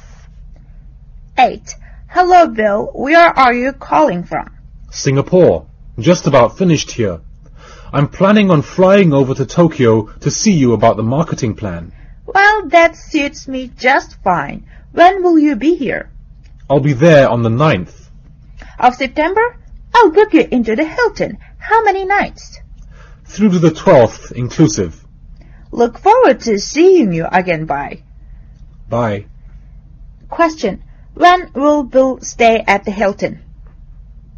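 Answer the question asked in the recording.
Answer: From 9th to 12th September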